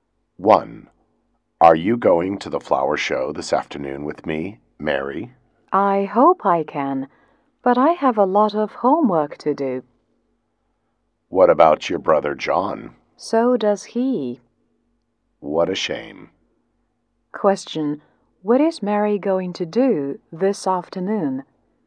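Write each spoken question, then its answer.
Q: What is Mary going to do this afternoon?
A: Do her homework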